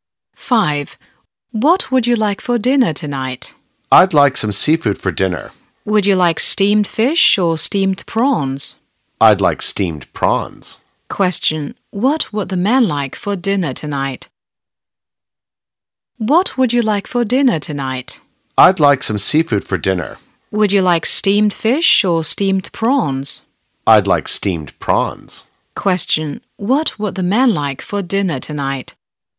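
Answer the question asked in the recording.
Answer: Steamed prawns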